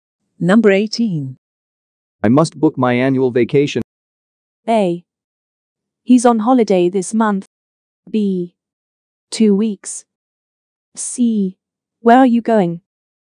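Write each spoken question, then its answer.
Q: I must book my annual vacation.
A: C: Where are you going?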